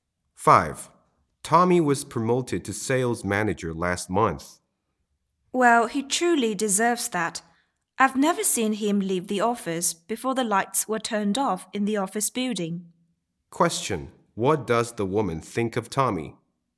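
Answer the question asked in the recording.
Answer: He is hardworking and deserves the promotion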